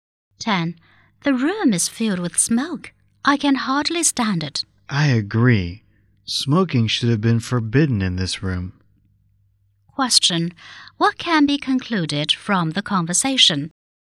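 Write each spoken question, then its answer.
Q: What can be concluded from the conversation?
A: Smoking is not forbidden in the room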